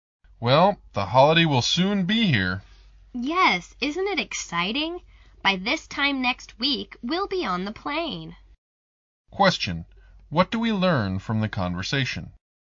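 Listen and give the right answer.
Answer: They will fly off on holiday next week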